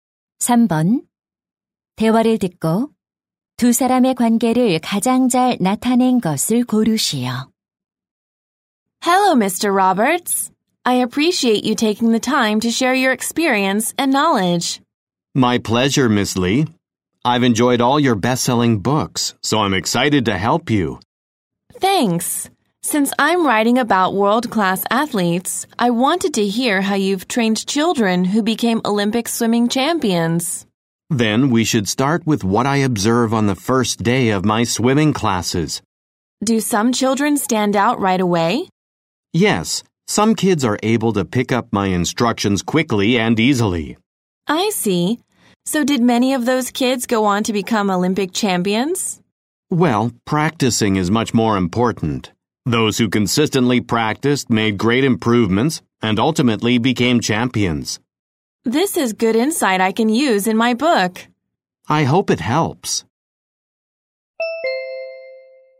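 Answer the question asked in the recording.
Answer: 작가 - 수영 코치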